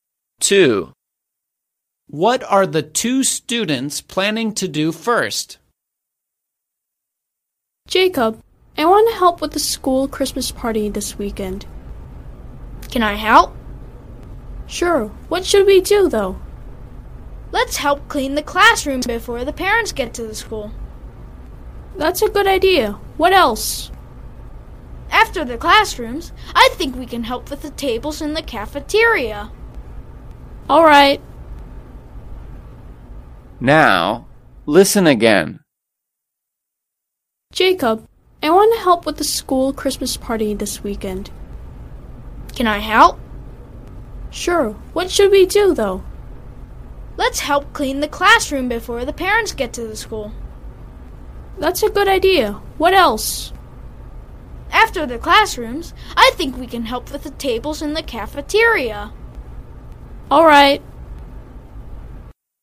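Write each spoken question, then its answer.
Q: What are the 2 students planning to do first?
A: Clean the classroom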